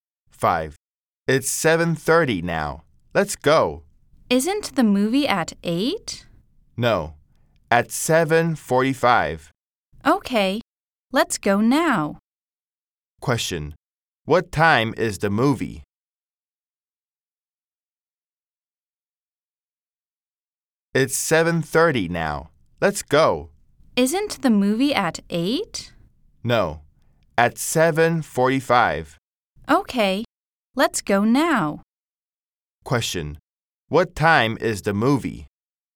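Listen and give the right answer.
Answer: 7:45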